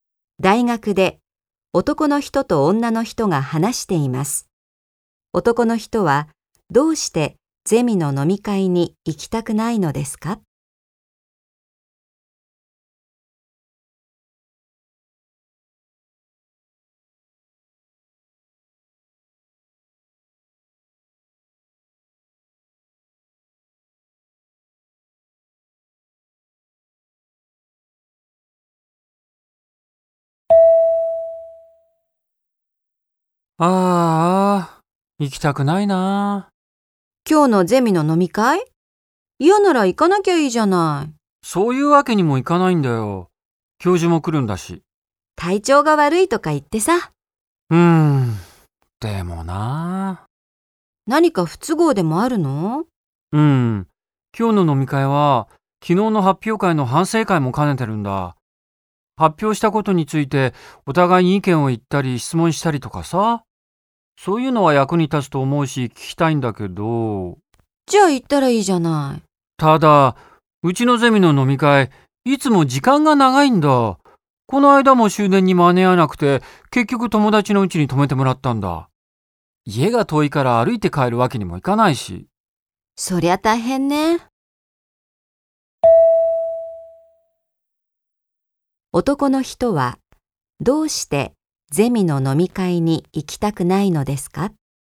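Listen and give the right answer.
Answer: 飲み会がいつも長くて、終電に間に合わなくなるから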